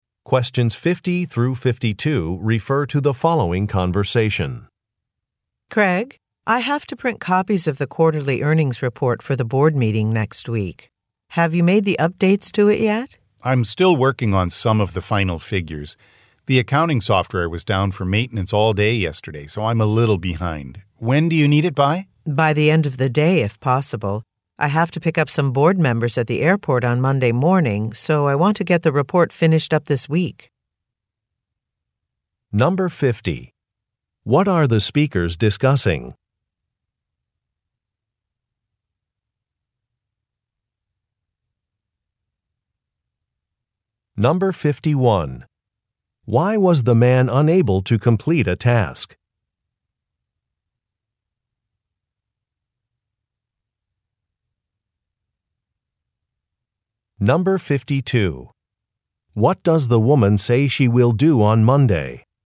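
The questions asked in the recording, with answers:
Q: What are the speakers discussing?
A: A quarterly earnings report for a board meeting

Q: Why was the man unable to complete a task?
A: The accounting software was down for maintenance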